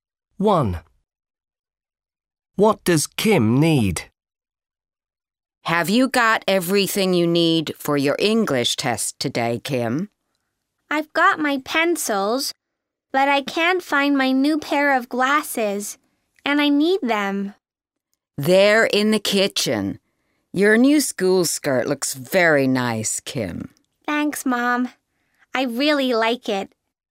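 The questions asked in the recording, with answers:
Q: What does Kim need?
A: her new glasses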